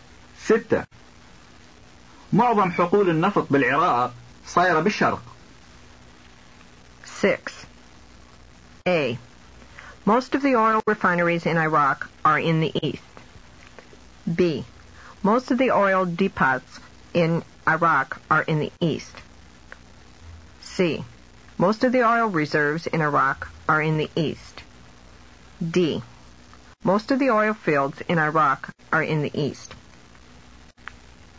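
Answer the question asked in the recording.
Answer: D: Most of the oil fields in Iraq are in the east.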